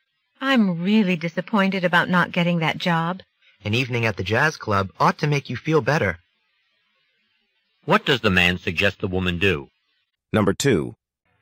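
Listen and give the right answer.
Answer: Spend an evening at the jazz club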